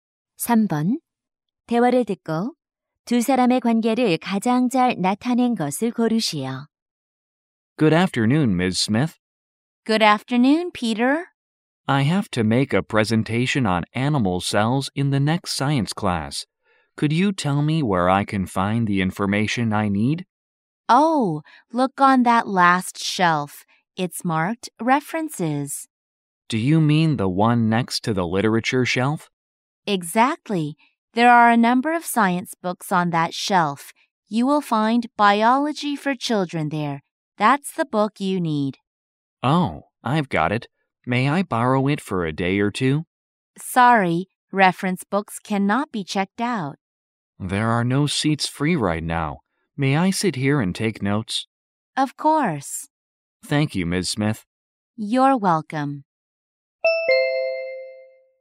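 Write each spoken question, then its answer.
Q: 대화를 듣고 두 사람의 관계를 가장 잘 나타낸 것을 고르시오.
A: 사서와 학생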